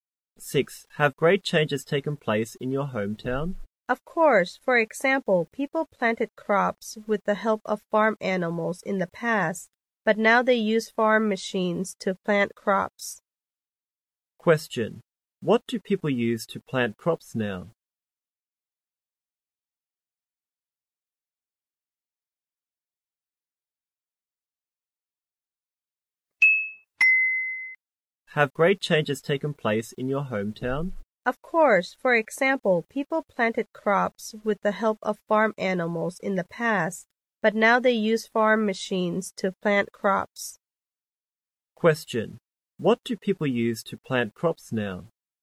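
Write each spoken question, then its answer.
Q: What do people use to plant crops now?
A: Farm machines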